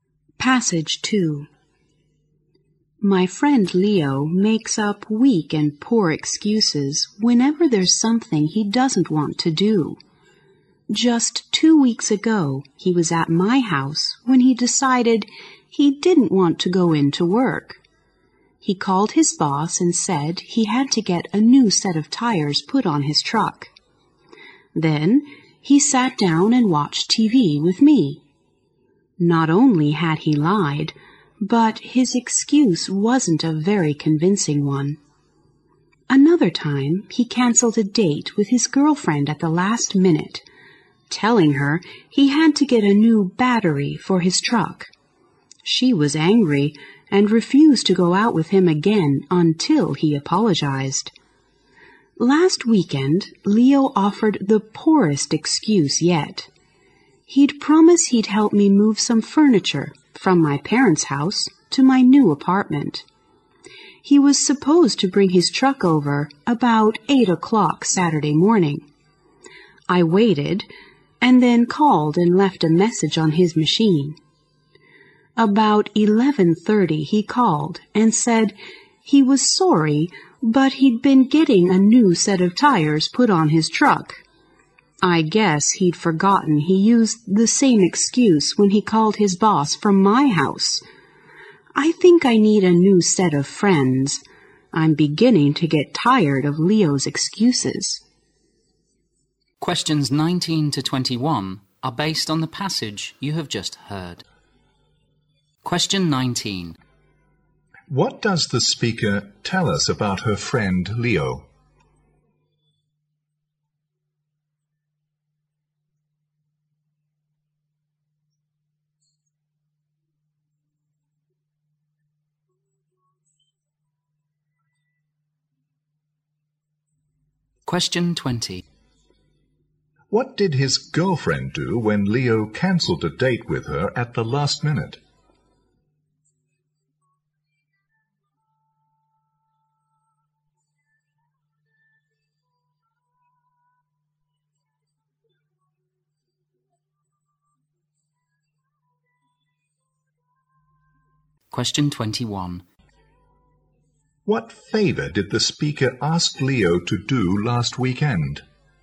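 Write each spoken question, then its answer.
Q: What does the speaker tell us about her friend Leo?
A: He makes up poor excuses.

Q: What did his girlfriend do when Leo cancelled a date with her at the last minute?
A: She refused to go out with him again until he apologized.

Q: What favor did the speaker ask Leo to do last weekend?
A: Help move some furniture to her new apartment.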